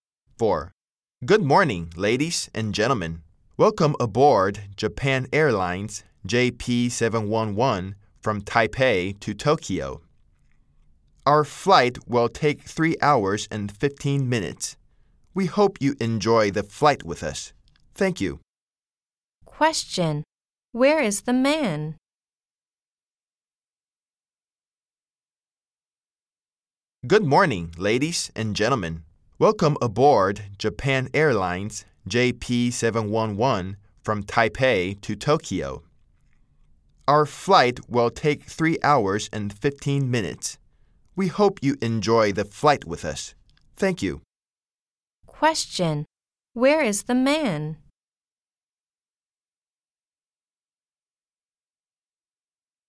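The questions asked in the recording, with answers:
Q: Question. Where is the man?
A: On a plane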